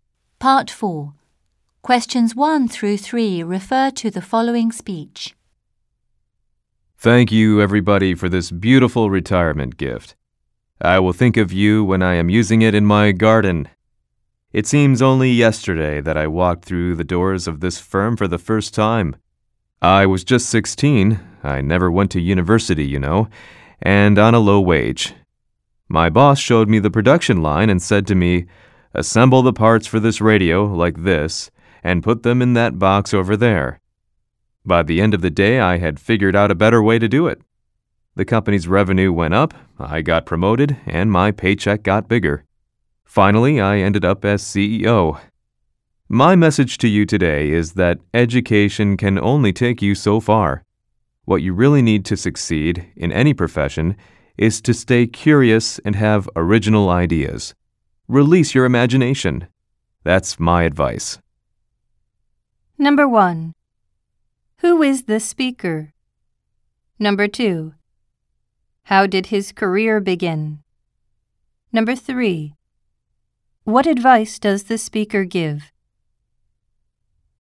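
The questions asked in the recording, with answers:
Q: Who is the speaker?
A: A retiring CEO of the company

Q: How did his career begin?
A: He started at 16 assembling radio parts on the production line for a low wage

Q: What advice does the speaker give?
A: Stay curious, have original ideas and use your imagination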